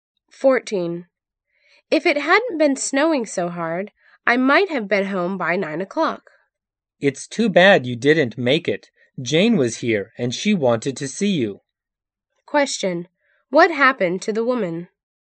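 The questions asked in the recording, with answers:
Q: What happened to the woman?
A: Heavy snow delayed her, so she got home late and missed Jane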